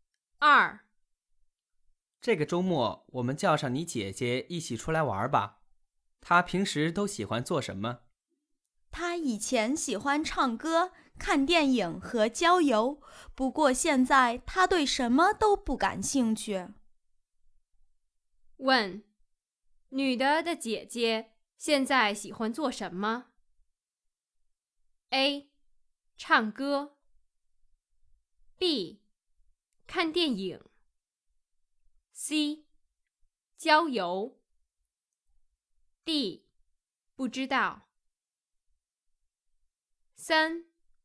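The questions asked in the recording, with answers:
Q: 问,女的的姐姐现在喜欢做什么? A. 唱歌 B. 看电影 C. 郊游 D. 不知道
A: D: 不知道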